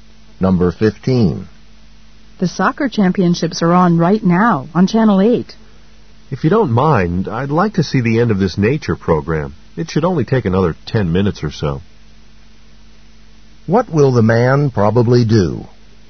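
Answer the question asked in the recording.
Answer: Watch the rest of the nature program before the soccer.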